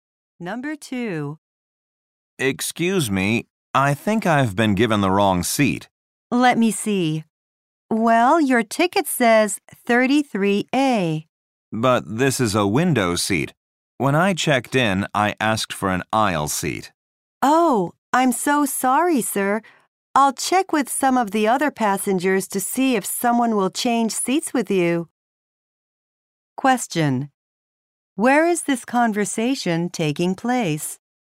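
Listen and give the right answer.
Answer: On an airplane.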